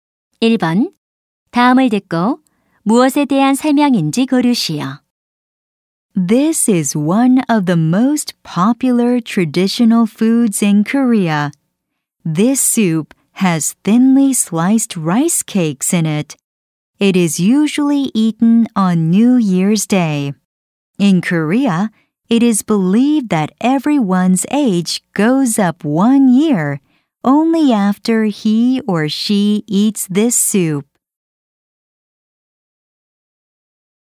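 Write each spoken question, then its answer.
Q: 다음을 듣고 무엇에 대한 설명인지 고르시오.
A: 떡국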